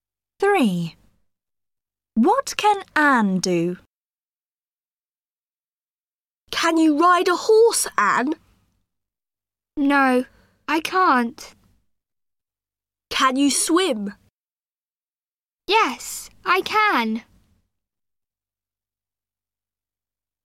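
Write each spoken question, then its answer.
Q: What can Anne do?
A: She can swim.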